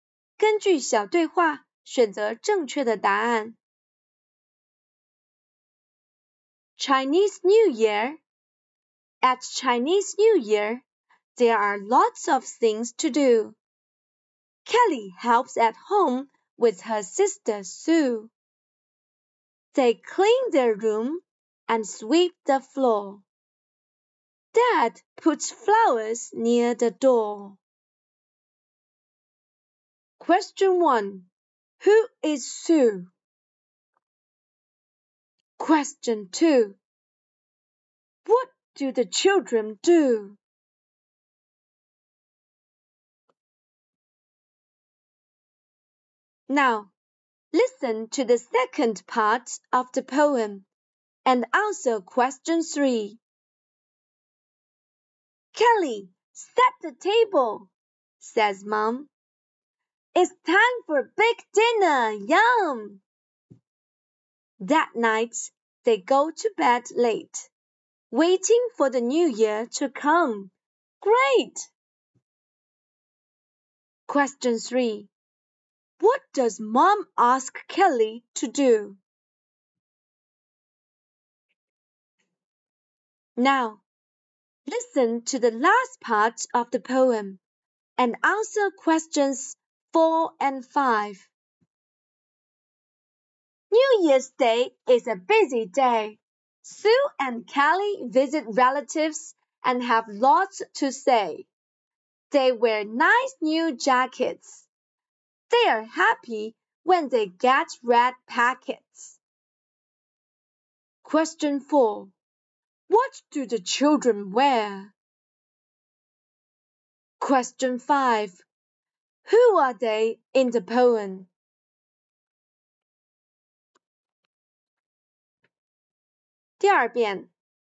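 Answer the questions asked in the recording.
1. Kelly's sister
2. They clean their room and sweep the floor.
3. Set the table.
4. Nice new jackets.
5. Sue and Kelly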